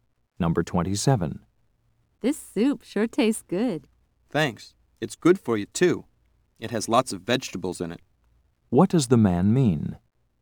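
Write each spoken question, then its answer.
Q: What does the man mean?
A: The soup is healthy.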